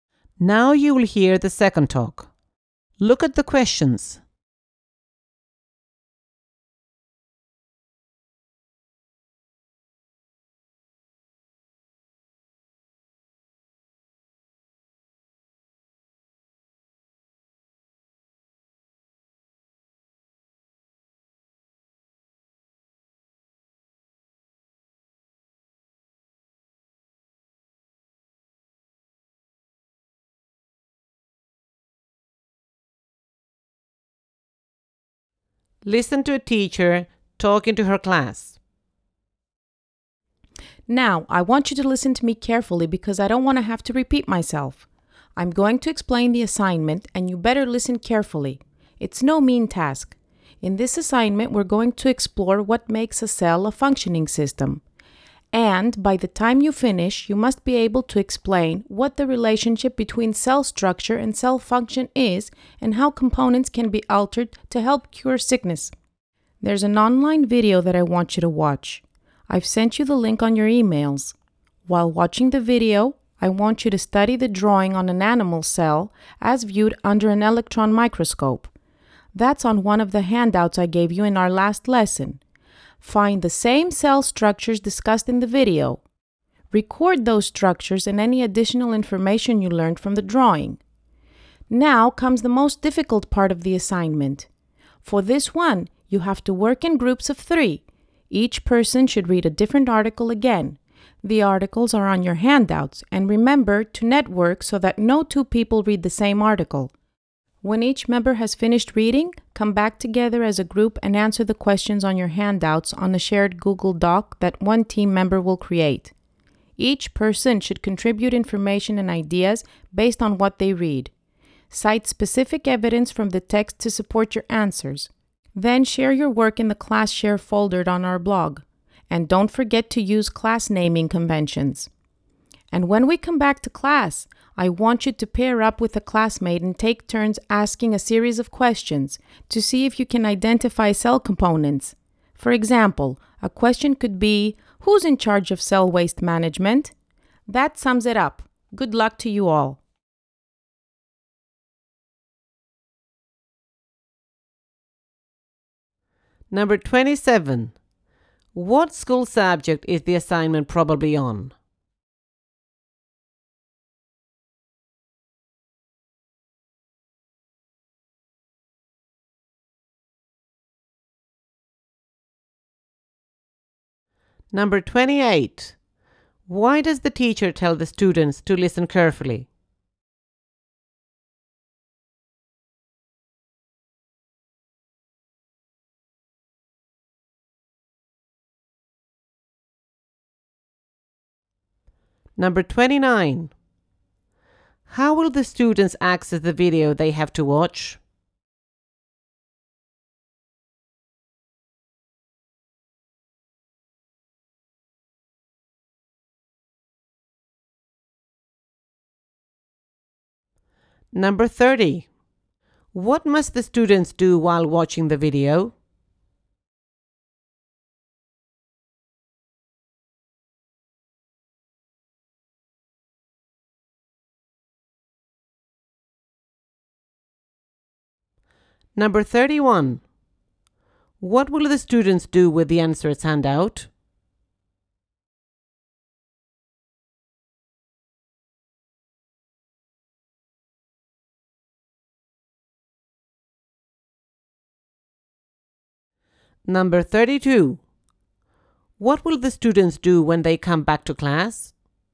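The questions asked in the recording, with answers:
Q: What school subject is the assignment probably on?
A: Biology

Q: Why does the teacher tell the students to listen carefully?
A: She doesn't want to repeat herself

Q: How will the students access the video they have to watch?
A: Through a link sent to their emails

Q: What must the students do while watching the video?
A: Study the drawing of an animal cell on the handout

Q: What will the students do when they come back to class?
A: Pair up and ask each other questions to identify cell components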